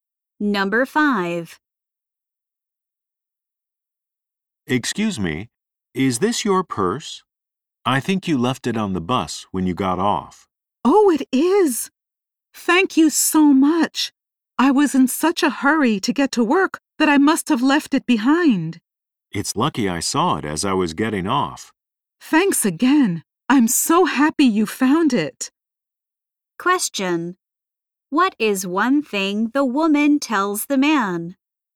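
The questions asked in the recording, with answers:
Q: What is one thing the woman tells the man?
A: She was in a hurry to get to work.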